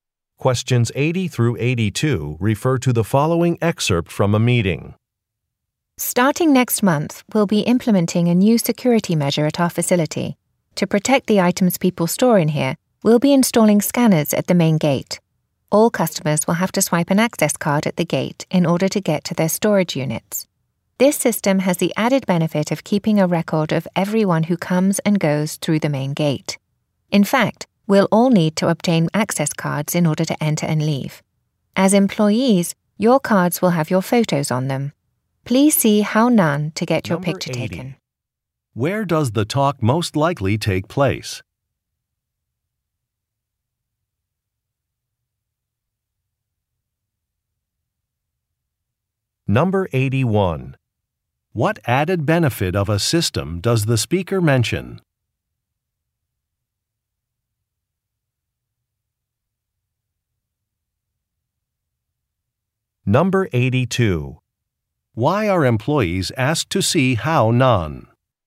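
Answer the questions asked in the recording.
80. At a storage facility
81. It keeps a record of everyone who comes and goes through the main gate
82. To get their picture taken for access cards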